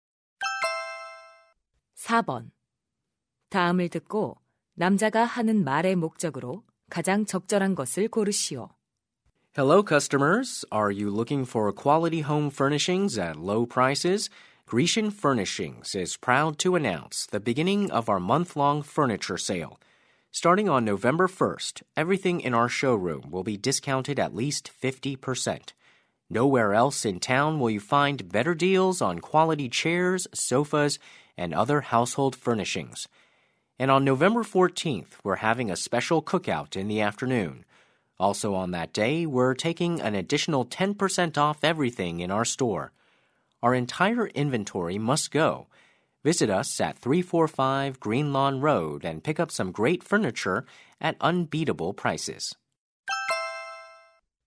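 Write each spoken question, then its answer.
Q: 다음을 듣고 남자가 하는 말의 목적으로 가장 적절한 것을 고르시오.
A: 가구 할인 판매를 홍보하려고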